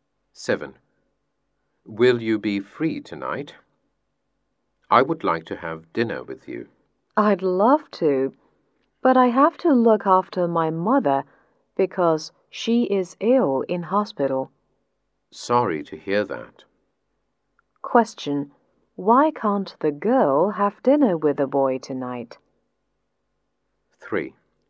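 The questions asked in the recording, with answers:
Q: Why can't the girl have dinner with the boy tonight?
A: She has to look after her mother, who is ill in hospital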